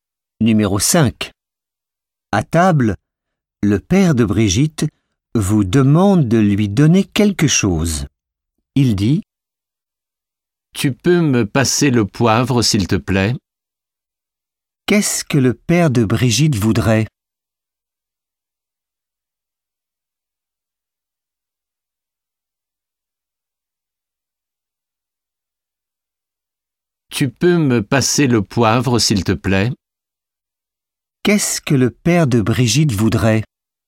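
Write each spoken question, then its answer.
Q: Qu'est-ce que le père de Brigitte voudrait?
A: Le poivre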